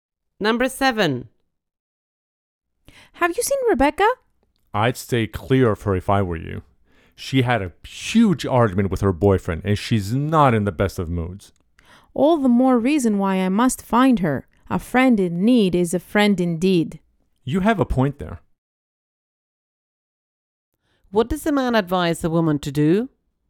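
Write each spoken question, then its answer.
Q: What does the man advise the woman to do?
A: Stay away from Rebecca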